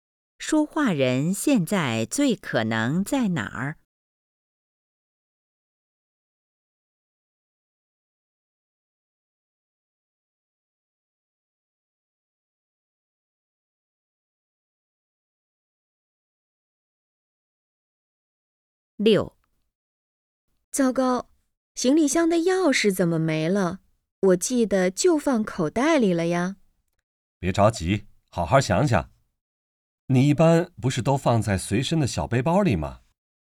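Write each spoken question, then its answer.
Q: 女的怎么了?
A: 行李箱的钥匙找不到了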